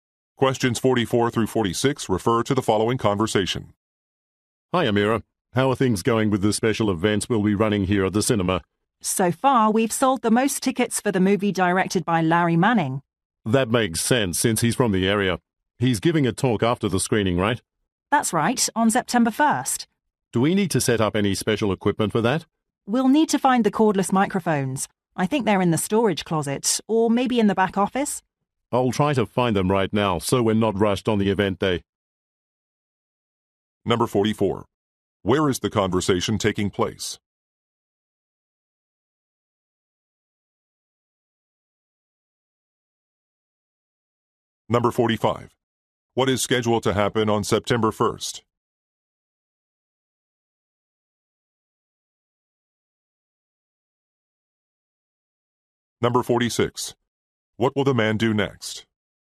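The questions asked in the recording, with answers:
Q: Where is the conversation taking place?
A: At a cinema

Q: What is scheduled to happen on September 1st?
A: Director Larry Manning will give a talk after the screening

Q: What will the man do next?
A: Look for the cordless microphones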